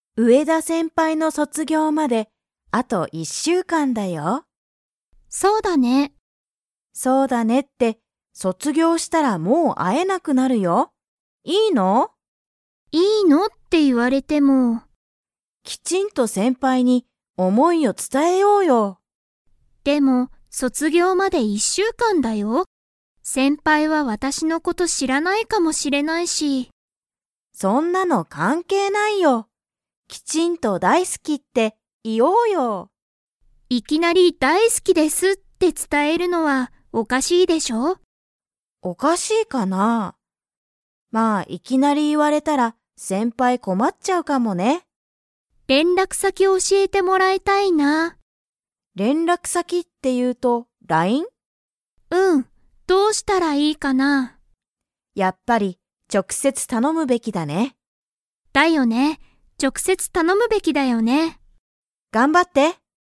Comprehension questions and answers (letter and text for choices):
Comprehension Quiz (Skip if you don't understand the conversation yet)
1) 先輩せんぱいは、あと一週間いっしゅうかんで何なにをしますか?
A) 思おもい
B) 卒業そつぎょう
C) 大好だいすき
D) 連絡れんらく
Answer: B) 卒業そつぎょう

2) ミキは、先輩せんぱいの を教おしえてもらいたい。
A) 一週間いっしゅうかん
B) 電話でんわ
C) おかしい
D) 連絡れんらく先さき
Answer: D) 連絡れんらく先さき

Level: Level 4